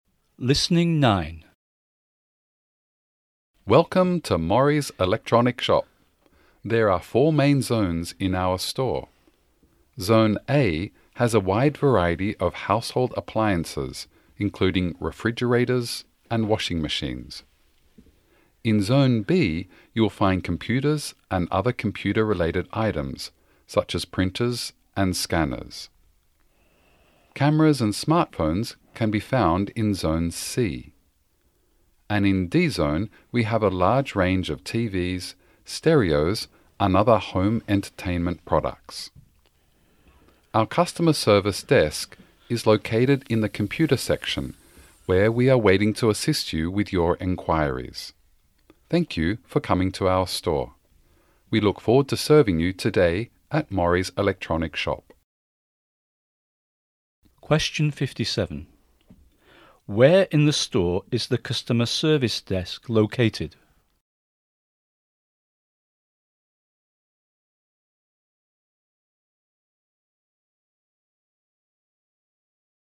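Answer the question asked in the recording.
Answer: In Zone B, the computer section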